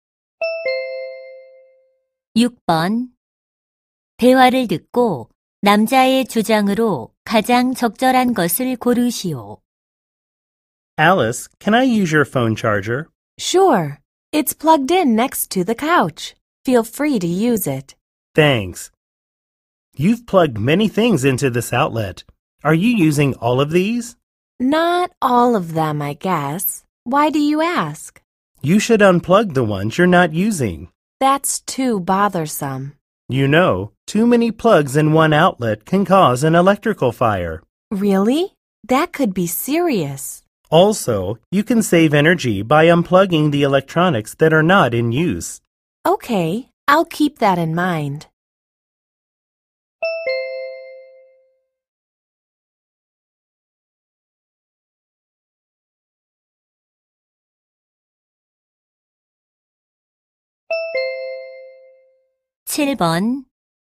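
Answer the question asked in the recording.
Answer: 사용하지 않는 전기 플러그는 뽑아야 한다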